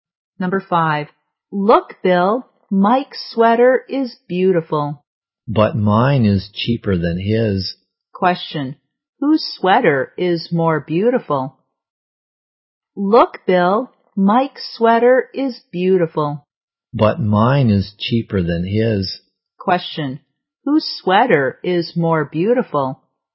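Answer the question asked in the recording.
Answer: Mike's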